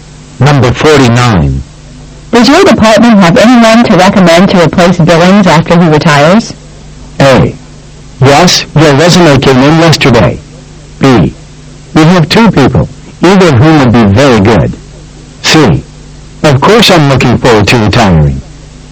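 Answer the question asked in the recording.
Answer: B: We have 2 people, either of whom would be very good.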